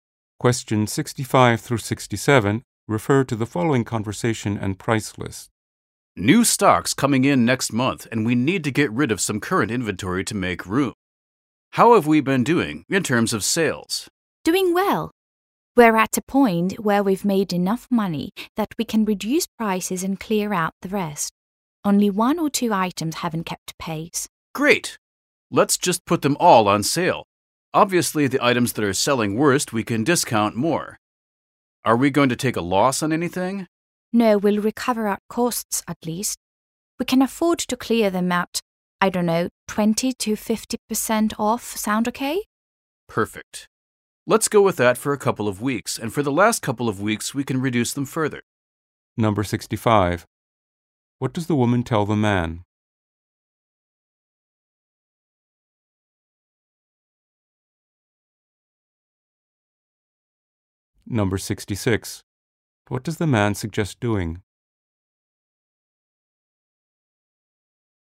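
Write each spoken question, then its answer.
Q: What does the man suggest doing?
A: Putting all the items on sale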